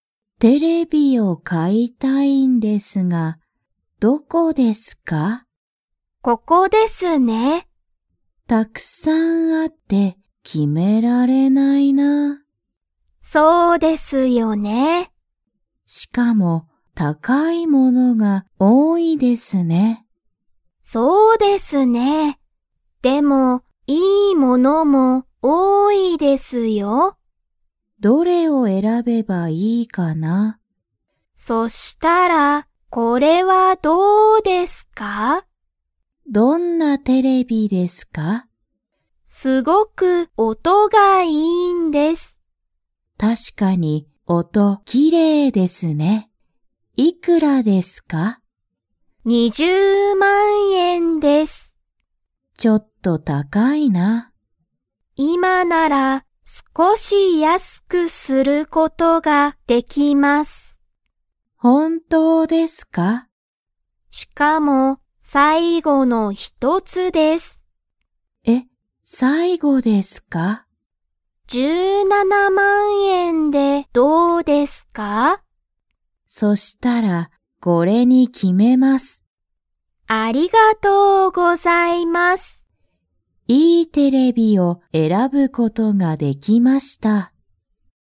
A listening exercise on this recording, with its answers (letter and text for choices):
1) 店員(てんいん)は、そのテレビを安(やす)くすることができますか?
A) はい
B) いいえ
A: A) はい

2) 客(きゃく)は、____円(えん)でそのテレビを買(か)う。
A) 17,000いちまんななせん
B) 20,000にまん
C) 170,000じゅうななまん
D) 200,000にじゅうまん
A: C) 170,000じゅうななまん

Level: Level 2